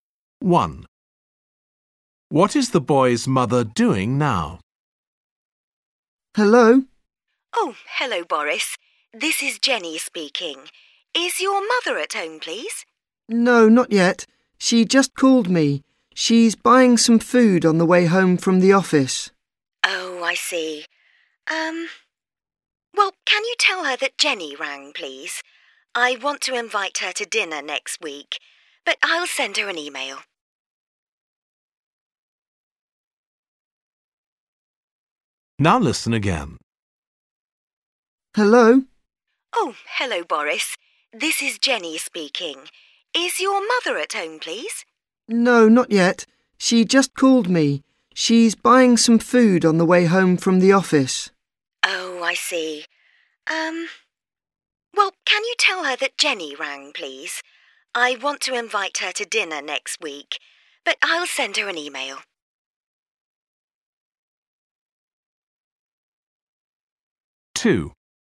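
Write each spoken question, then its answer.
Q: What is the boy's mother doing now?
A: Buying food on the way home from the office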